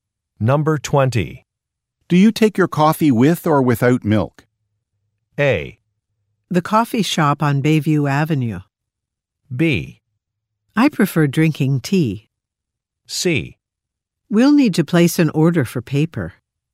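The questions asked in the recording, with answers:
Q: Do you take your coffee with or without milk?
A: B: I prefer drinking tea.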